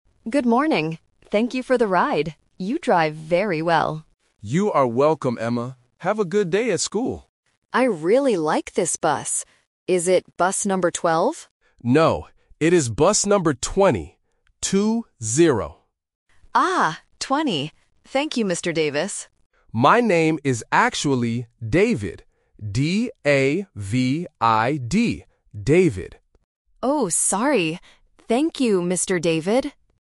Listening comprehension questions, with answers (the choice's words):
Listen to the conversation and choose the correct answer (A, B, or C).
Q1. Who is Emma talking to?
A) A bus driver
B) A teacher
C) A doctor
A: A bus driver

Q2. What is the number of the bus?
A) 12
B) 20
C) 22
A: 20

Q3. What is the driver's name?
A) Davis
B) David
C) Daniel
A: David

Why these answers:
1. Emma says "Thank you for the ride," "You drive very well," and asks about the "bus number." This clearly shows she is talking to a bus driver. Option (B) is a trap because the driver mentions "school", which might confuse listeners into thinking he is a teacher. Option (C) is not mentioned.
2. The driver corrects Emma by saying, "it is bus number twenty. Two - zero." Option (A) is a trap because Emma asks, "Is it bus number twelve?", but the driver says "No". Option (C) is a random number distractor.
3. The driver clearly states his name and spells it: "D-A-V-I-D." Option (A) is a trap because Emma initially calls him "Mr. Davis", and the two names sound very similar at the end. Option (C) is a plausible name but is not mentioned.

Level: A1